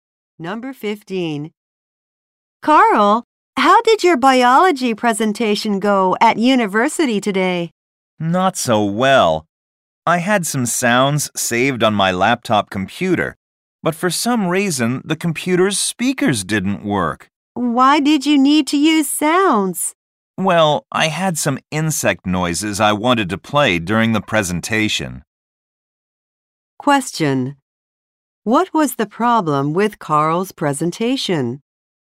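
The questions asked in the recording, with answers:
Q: What was the problem with Carl's presentation?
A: His laptop's speakers didn't work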